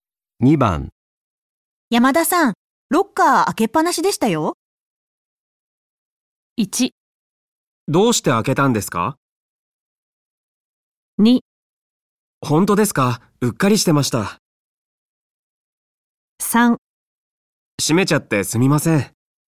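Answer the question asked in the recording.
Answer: 2: 本当ですか?うっかりしてました。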